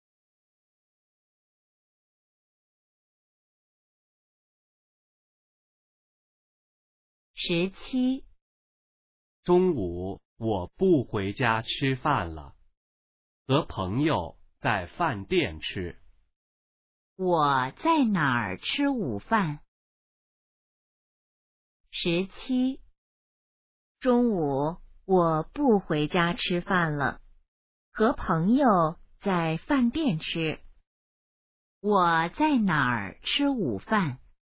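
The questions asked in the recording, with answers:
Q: 我在哪儿吃午饭?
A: 饭店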